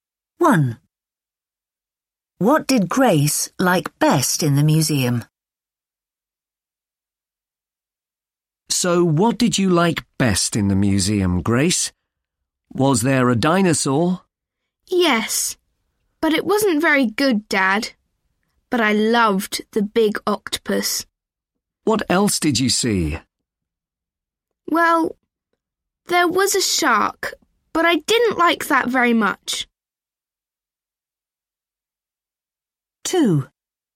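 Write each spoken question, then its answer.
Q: What did Grace like best in the museum?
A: the big octopus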